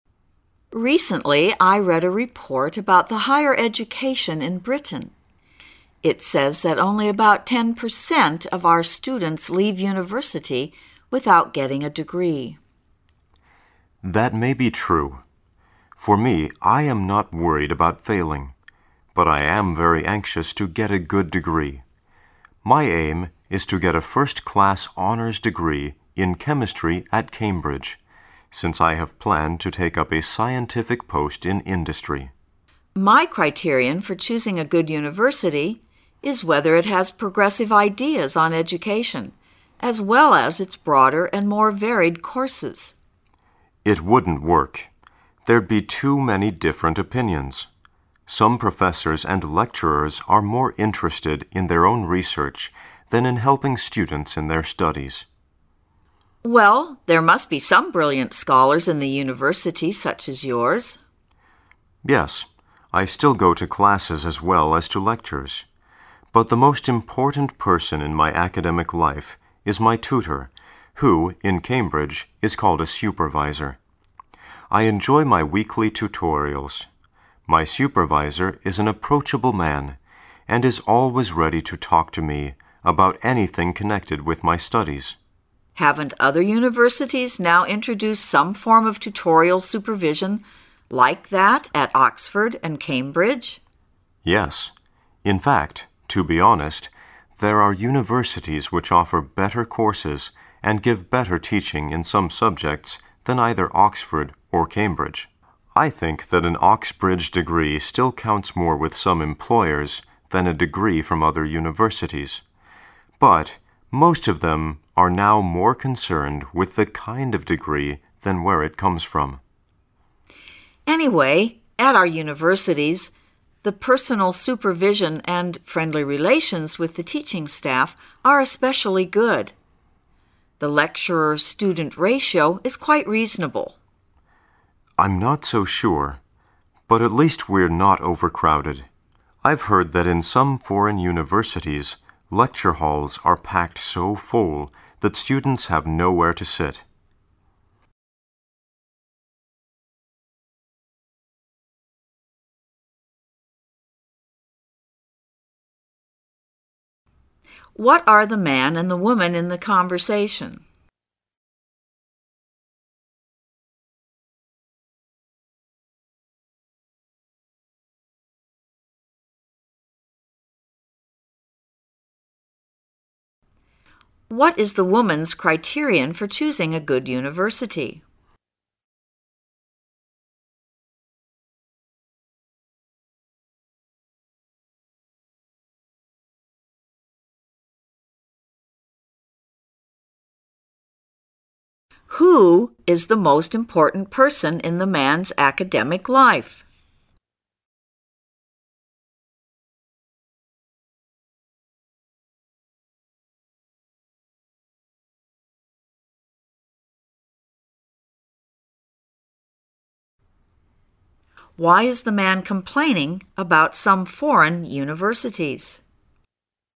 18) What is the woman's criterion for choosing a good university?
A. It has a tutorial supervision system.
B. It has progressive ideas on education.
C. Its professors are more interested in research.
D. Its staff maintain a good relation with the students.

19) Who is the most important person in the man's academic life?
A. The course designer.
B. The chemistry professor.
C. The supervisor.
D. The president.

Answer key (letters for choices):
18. B
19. C

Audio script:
[解析] 27-30 W: Recently, I read a report about the higher education in Britain. It says that only about 10 per cent of our students leave university without getting a degree. M: That may he true. For me, I am not worried about failing, but I am very anxious to get a good degree. My aim is to get a first-class honours degree in chemistry at Cambridge, since I have planned to take up a scientific post in industry. W: My criterion for choosing a good university is whether it has progressive ideas on education as well as its broader and more varied courses. M: It wouldn't work. There'd he too many different opinions. Some professors and lecturers are more interested in their own research than in helping students in their studies. W: Well, there must be some brilliant scholars in the university such as yours. M: Yes. I still go to classes as well as to lectures, but the most important person in my academic life is my tutor who, in Cambridge, is called a supervisor. I enjoy my weekly tutorials. My supervisor is an approachable man and is always ready to talk to me about anything connected with my studies. W: Haven't other universities now introduced some form of tutorial supervision like that at Oxford and Cambridge? M: Yes. In fact, to be honest, there are universities which offer better courses and give better teaching in some subjects than either Oxford or Cambridge. I think that an Oxbridge degree still counts more with some employers than a degree from other universities, but most of them are now more concerned with the kind of degree than where it comes from. W: Anyway, at our universities, the personal supervision and friendly relations with the teaching staff are especially good. The lecturer-student ratio is quite reasonable. M: I'm not so sure, but at least we're not overcrowded. I've heard that in some foreign universities lecture halls are packed so full that students have nowhere to sit. What are the man and the woman in the conversation?